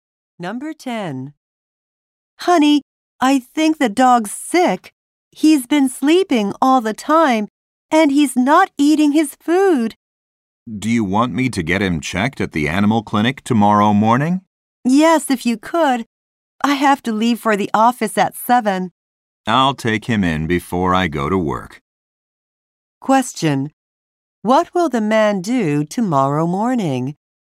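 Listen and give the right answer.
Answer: Take the dog to the animal clinic.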